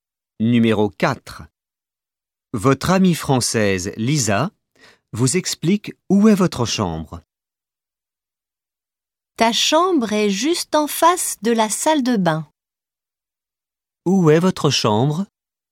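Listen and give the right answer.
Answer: En face de la salle de bain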